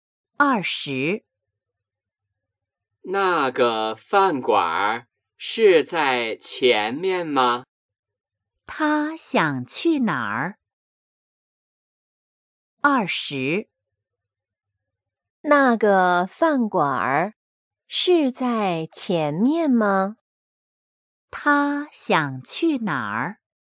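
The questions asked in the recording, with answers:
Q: 他想去哪儿?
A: 饭馆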